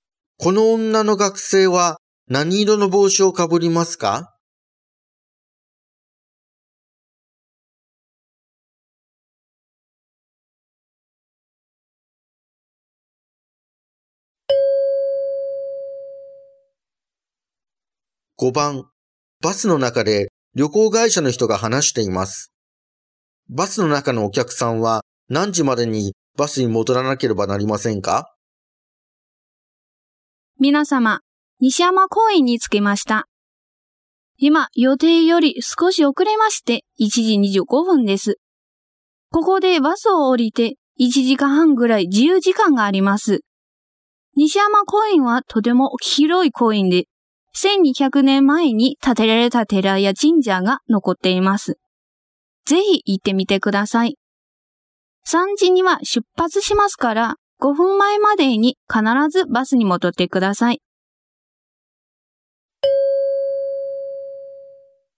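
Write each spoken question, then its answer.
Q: バスの中のお客さんは何時までにバスに戻らなければなりませんか?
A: 2時55分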